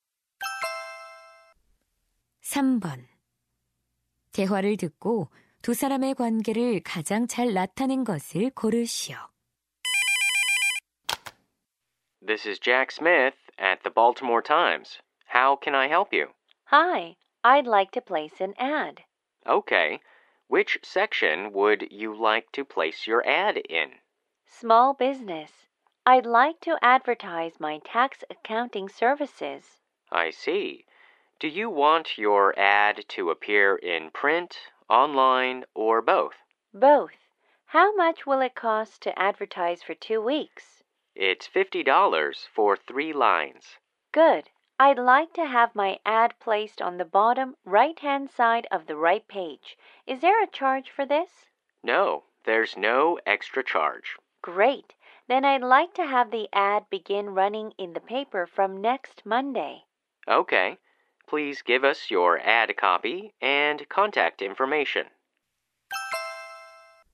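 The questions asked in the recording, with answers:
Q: 대화를 듣고 두 사람의 관계를 가장 잘 나타낸 것을 고르시오.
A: 신문사 광고 담당 직원 - 광고 의뢰인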